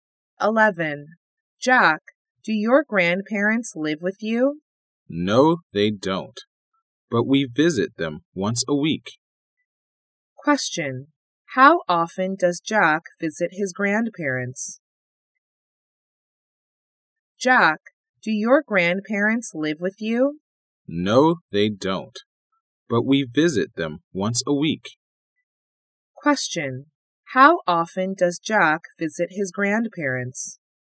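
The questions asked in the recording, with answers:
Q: How often does Jack visit his grandparents?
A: Once a week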